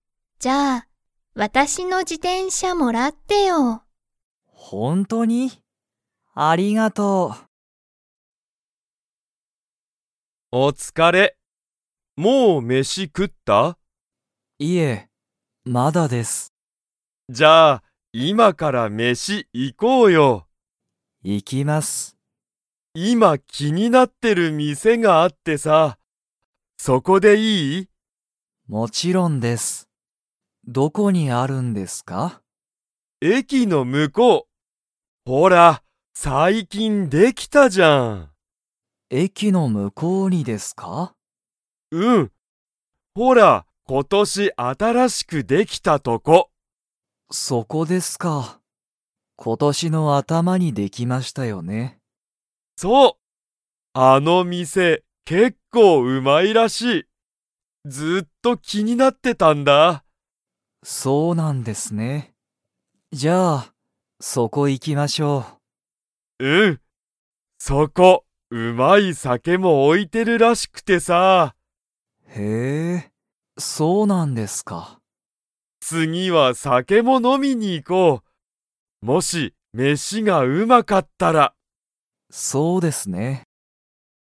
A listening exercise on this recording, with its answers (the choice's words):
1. 斉藤さいとうさんが気きになってる店みせは、いつできましたか?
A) 昨日きのう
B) 今日きょう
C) 今年ことし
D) 二年にねん前まえ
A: 今年ことし

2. 斉藤さいとうさんと鈴木すずきさんは、今日きょう酒さけを飲のみに 。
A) 行いく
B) 行いかない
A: 行いかない

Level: Level 3